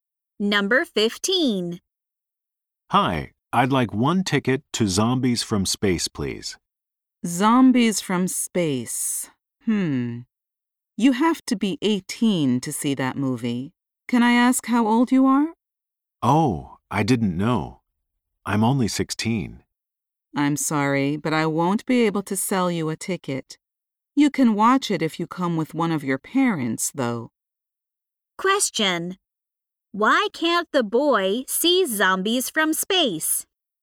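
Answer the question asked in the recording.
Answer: He is only 16 and you have to be 18.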